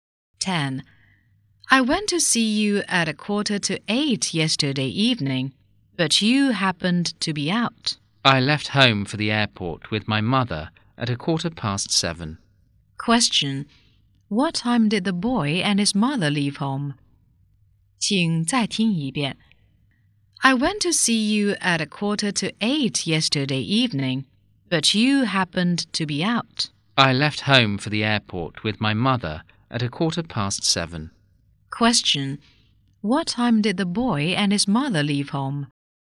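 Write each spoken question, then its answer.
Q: Question. What time did the boy and his mother leave home?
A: At 7:15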